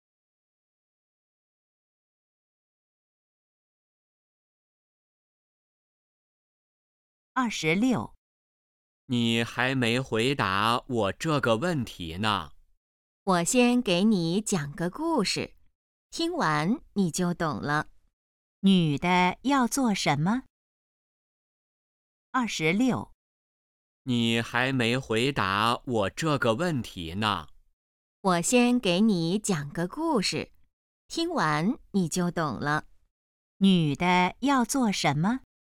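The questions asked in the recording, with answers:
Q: 女的要做什么?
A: 讲故事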